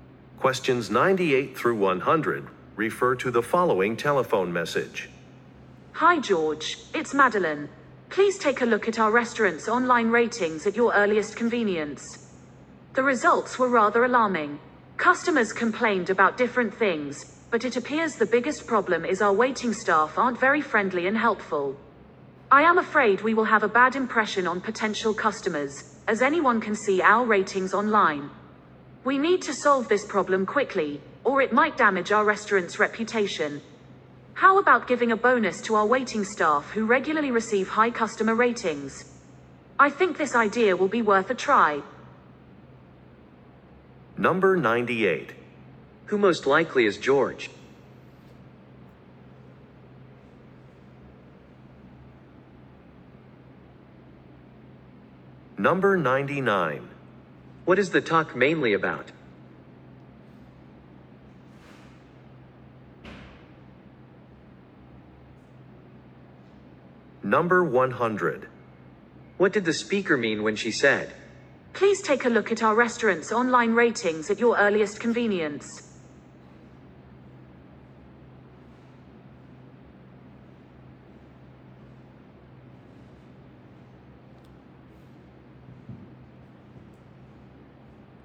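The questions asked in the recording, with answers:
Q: What is the talk mainly about?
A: Poor online customer ratings of the restaurant, mainly because of unfriendly waiting staff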